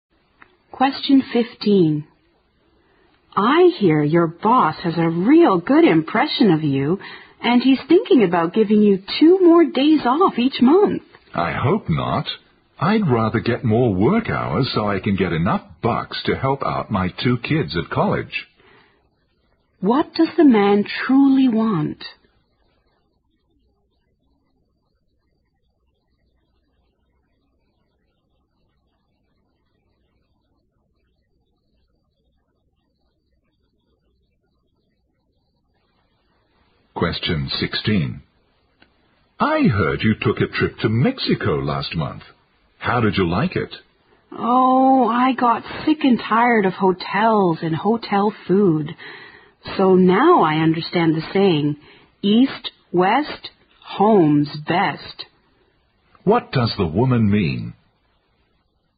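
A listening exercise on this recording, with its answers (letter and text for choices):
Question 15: What does the man truly want?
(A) More money.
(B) Fair treatment.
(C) A college education.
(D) Shorter work hours.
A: (A) More money.

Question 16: What does the woman mean?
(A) She was exhausted from her trip.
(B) She missed the comforts of home.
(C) She was impressed by Mexican food.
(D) She will not go to Mexico again.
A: (B) She missed the comforts of home.

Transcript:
W: I hear your boss has a real good impression of you and he is thinking about giving you two more days off each month.
M: I hope not. I'd rather get more work hours so I can get enough bucks to help out my two kids at college.
Q: What does the man truly want?
M: I heard you took a trip to Mexico last month. How did you like it?
W: Oh, I got sick and tired of hotels and hotel food. So now I understand the saying, "East, west, home's best".
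Q: What does the woman mean?

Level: 六级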